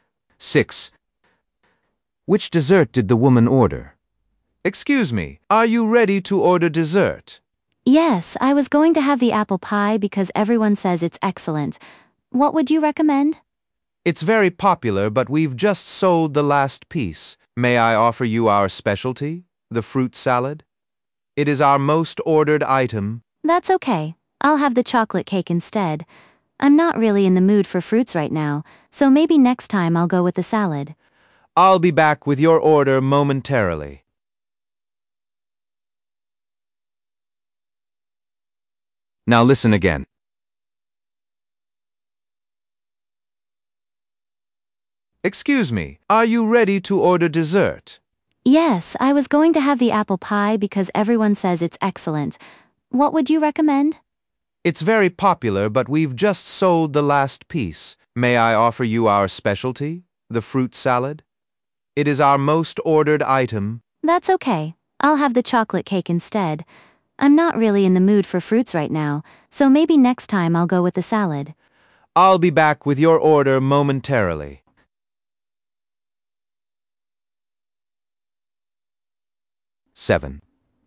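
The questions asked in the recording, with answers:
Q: Which dessert did the woman order?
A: chocolate cake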